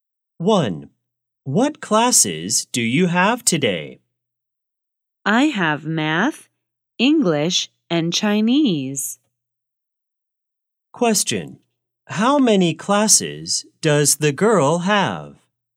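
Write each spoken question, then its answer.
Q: How many classes does the girl have?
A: Three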